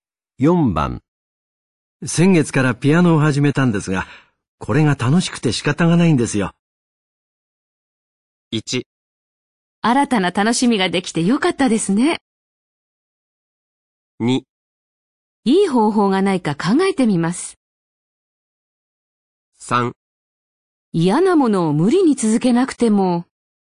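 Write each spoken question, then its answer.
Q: 先月からピアノを始めたんですが、これが楽しくて仕方がないんですよ。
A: 1: 新たな楽しみができてよかったですね。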